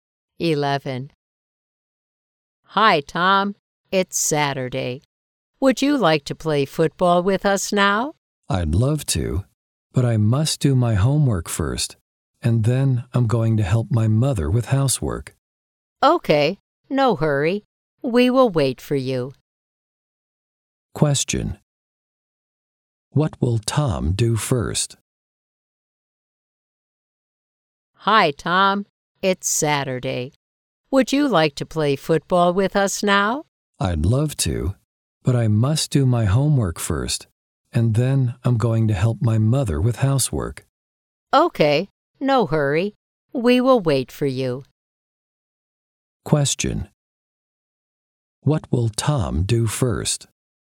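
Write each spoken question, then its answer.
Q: What will Tom do first?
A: Do his homework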